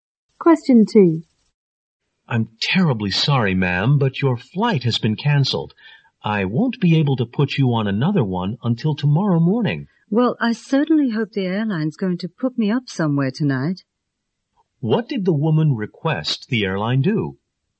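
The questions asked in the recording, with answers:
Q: What did the woman request the airline do?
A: Give her a place to stay tonight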